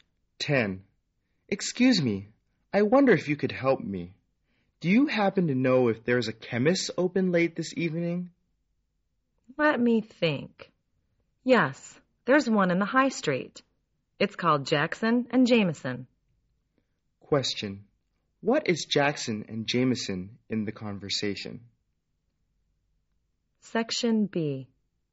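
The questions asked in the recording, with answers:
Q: What is Jackson and Jameson in the conversation?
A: A chemist's shop.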